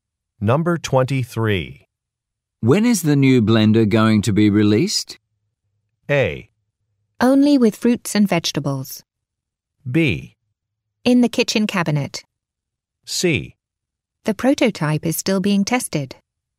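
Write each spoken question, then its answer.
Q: When is the new blender going to be released?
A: C: The prototype is still being tested.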